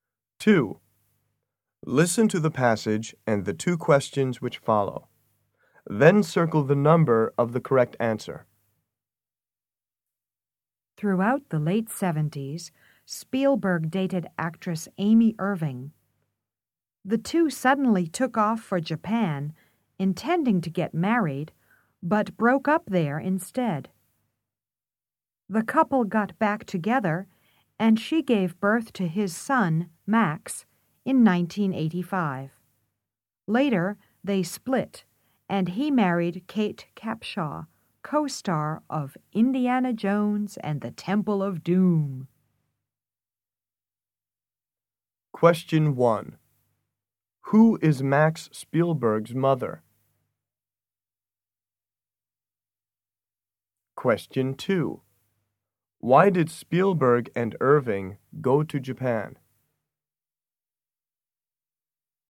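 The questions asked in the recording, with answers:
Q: Who is Max Spielberg's mother?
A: Amy Irving

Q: Why did Spielberg and Irving go to Japan?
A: To get married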